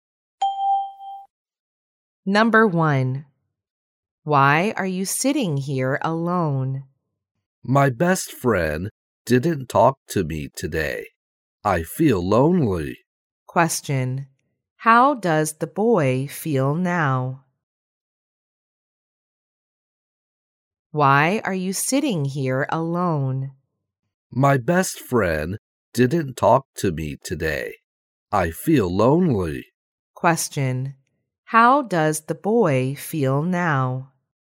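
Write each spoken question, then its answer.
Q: How does the boy feel now?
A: Lonely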